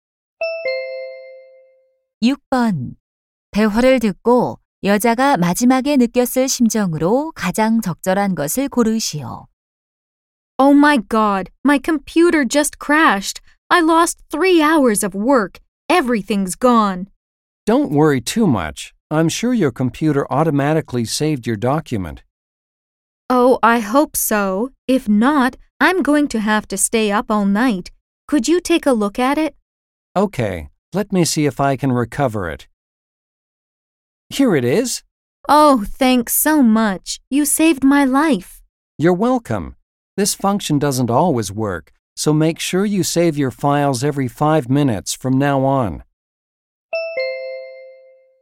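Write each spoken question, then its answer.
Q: 대화를 듣고 여자가 마지막에 느꼈을 심정으로 가장 적절한 것을 고르시오.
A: 안도함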